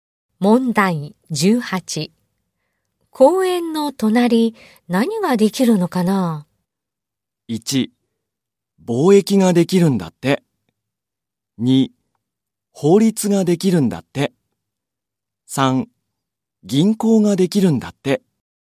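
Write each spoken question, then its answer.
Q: 公園の隣、何ができるのかな?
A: 3: 銀行ができるんだって。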